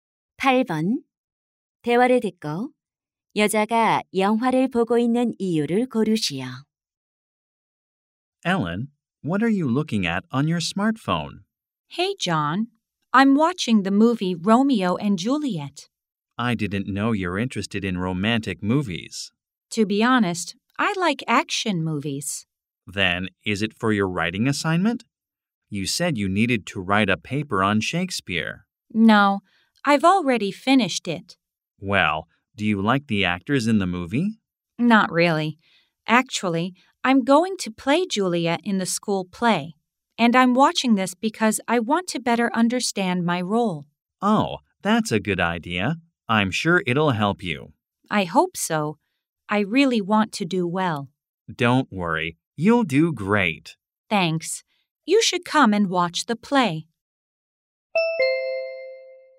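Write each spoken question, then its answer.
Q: 대화를 듣고 여자가 영화를 보고 있는 이유를 고르시오.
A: 학교 연극에서 맡은 줄리엣 역할을 더 잘 이해하려고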